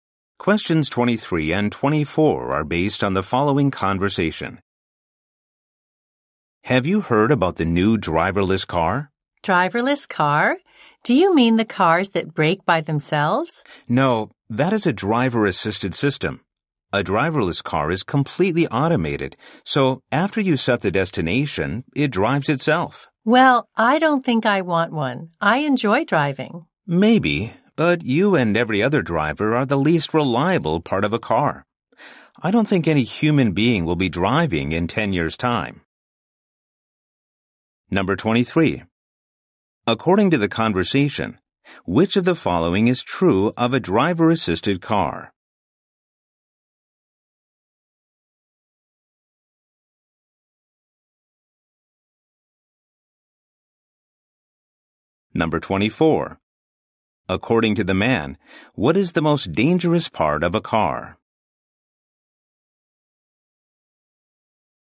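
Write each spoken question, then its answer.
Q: According to the man, what is the most dangerous part of a car?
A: The driver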